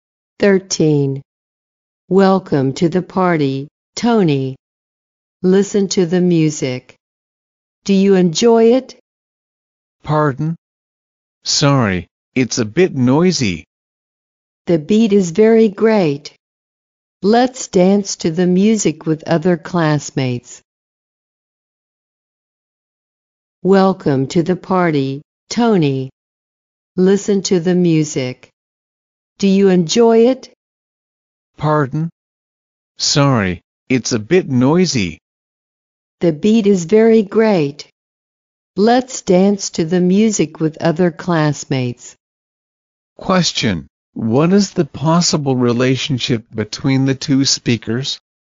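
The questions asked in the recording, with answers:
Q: Question, what is the possible relationship between the two speakers?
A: Classmates.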